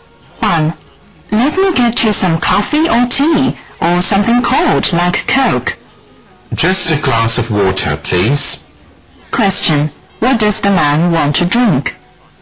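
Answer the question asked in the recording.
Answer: Water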